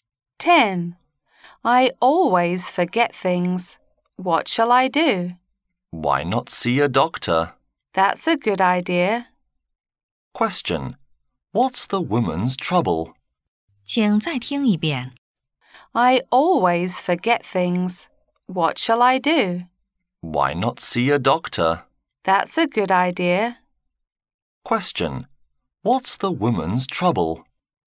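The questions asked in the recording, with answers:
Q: What's the woman's trouble?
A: She always forgets things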